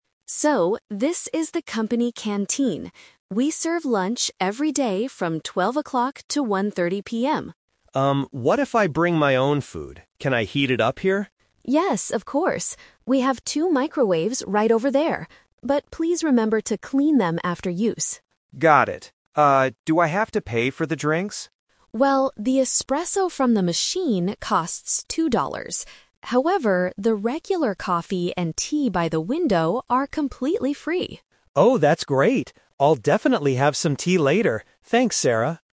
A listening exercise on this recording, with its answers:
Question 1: When does the canteen finish serving lunch?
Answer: At 1:30 PM

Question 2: What does Sarah ask Mark to do if he uses the microwave?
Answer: Clean it after using it.

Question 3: Where can Mark get free drinks?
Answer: By the window.

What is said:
Sarah: So, this is the company canteen. We serve lunch every day from 12:00 to 1:30 PM.
Mark: Um, what if I bring my own food? Can I heat it up here?
Sarah: Yes, of course. We have two microwaves right over there. But please remember to clean them after use.
Mark: Got it. Ah, do I have to pay for the drinks?
Sarah: Well, the espresso from the machine costs two dollars. However, the regular coffee and tea by the window are completely free.
Mark: Oh, that's great! I'll definitely have some tea later. Thanks, Sarah.